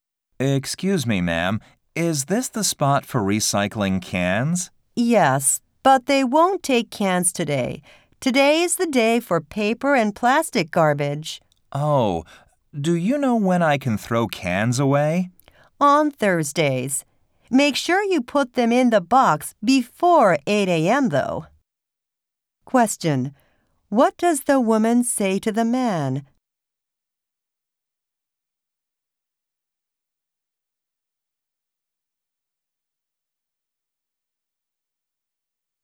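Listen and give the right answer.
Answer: Cans can't be put out today; he should bring them on Thursday before 8 a.m.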